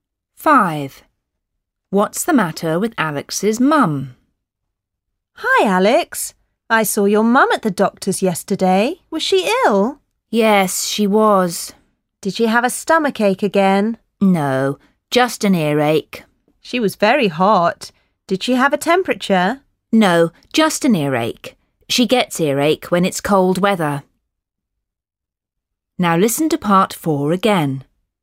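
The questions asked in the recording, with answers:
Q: What's the matter with Alex's mum?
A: an earache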